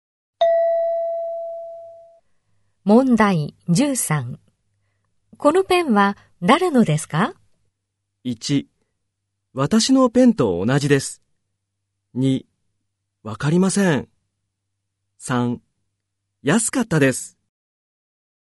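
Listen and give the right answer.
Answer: 2: わかりません。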